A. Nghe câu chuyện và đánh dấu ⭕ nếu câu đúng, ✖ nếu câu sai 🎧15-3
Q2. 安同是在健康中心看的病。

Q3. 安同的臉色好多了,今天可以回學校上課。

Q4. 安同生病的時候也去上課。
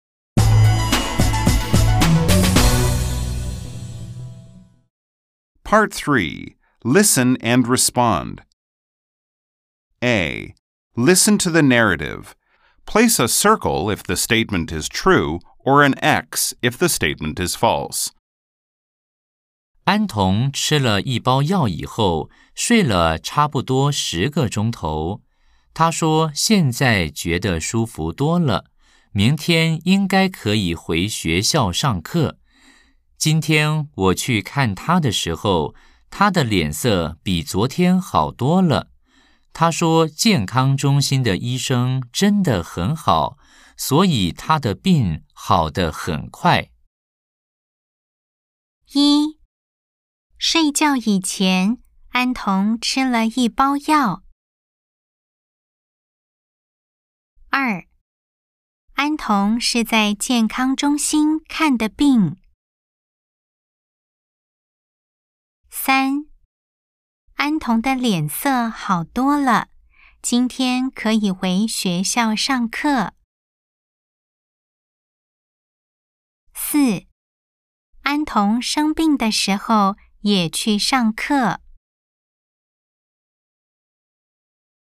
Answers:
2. O
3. X
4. X